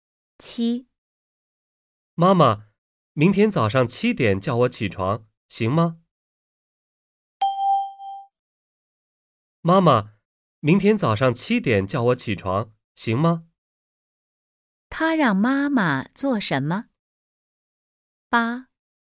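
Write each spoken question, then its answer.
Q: 他让妈妈做什么?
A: 明天早上七点叫他起床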